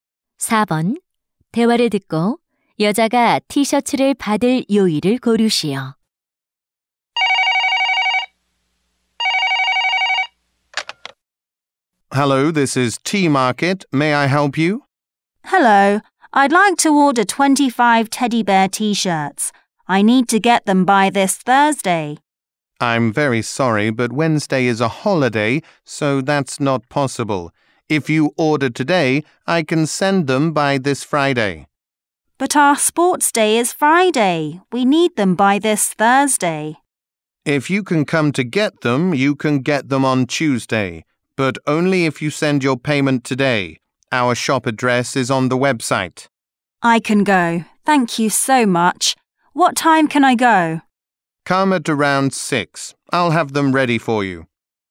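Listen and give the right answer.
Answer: 화요일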